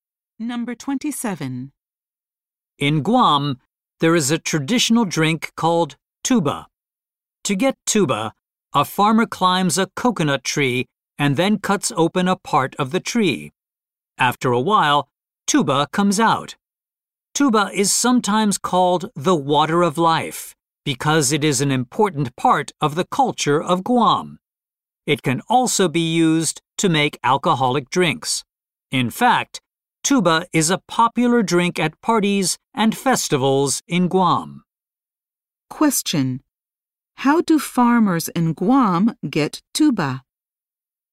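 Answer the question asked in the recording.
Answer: They climb a coconut tree and cut open part of it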